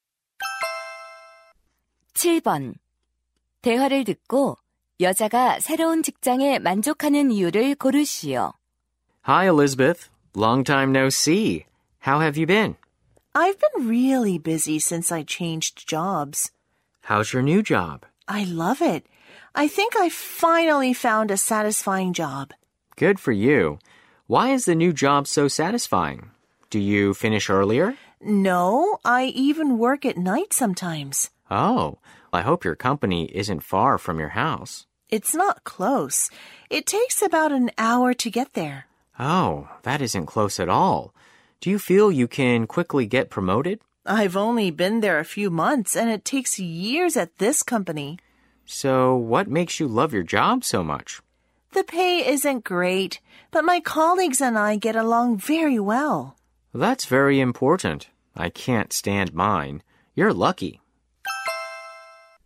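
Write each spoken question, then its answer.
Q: 대화를 듣고 여자가 새로운 직장에 만족하는 이유를 고르시오.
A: 동료들과 사이가 좋아서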